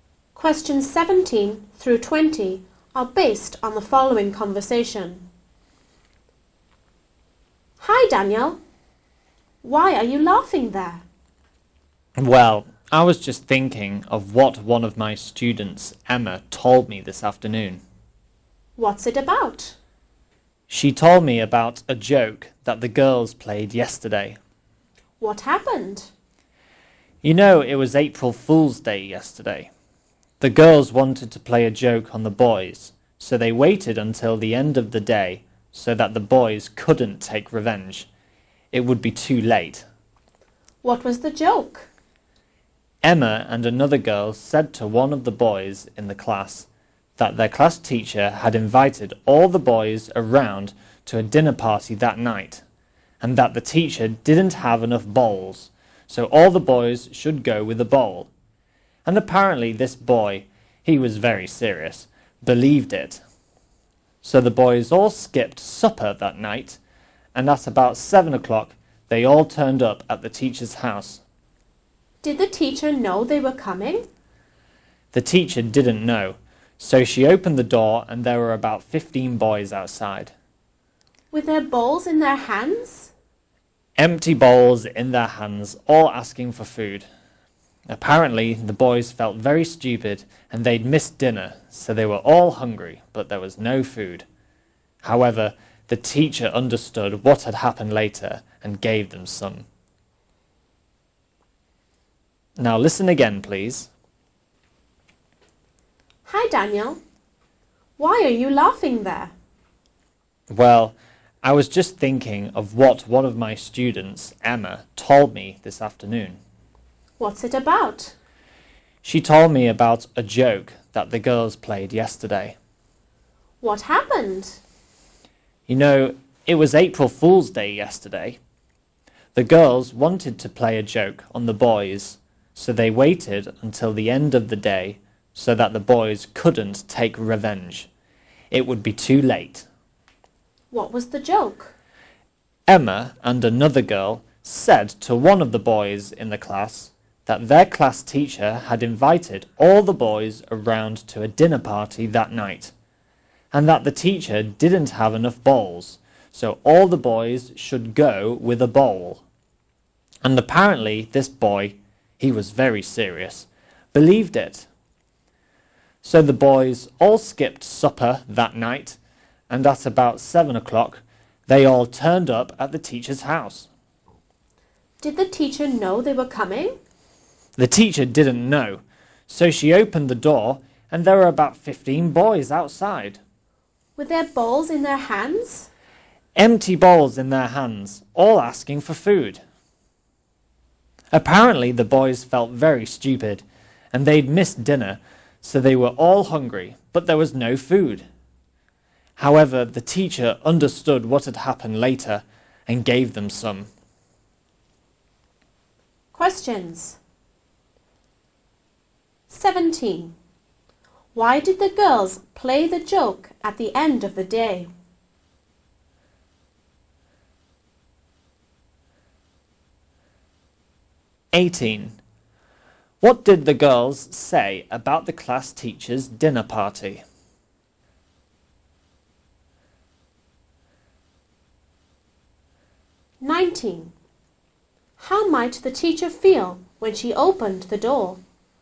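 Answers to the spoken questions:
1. So that the boys couldn't take revenge
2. The teacher had invited all the boys and they should each bring a bowl
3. Surprised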